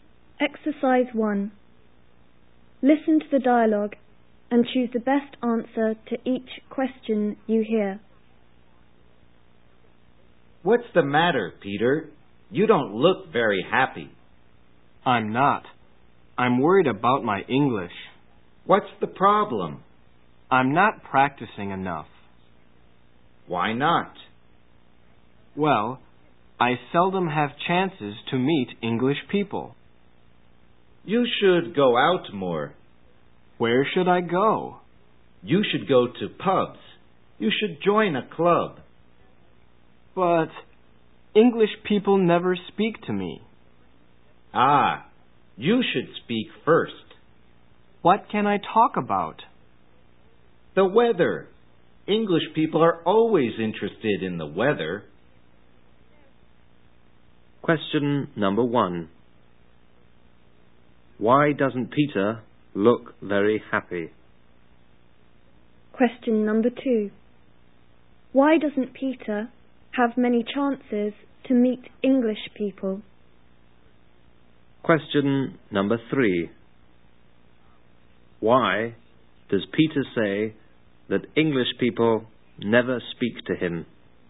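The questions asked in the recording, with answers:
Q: Why doesn't Peter look very happy?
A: He is worried about his English because he isn't practising enough.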